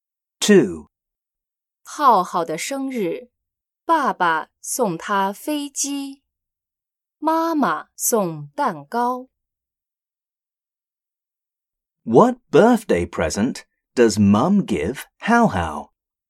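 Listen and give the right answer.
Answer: A cake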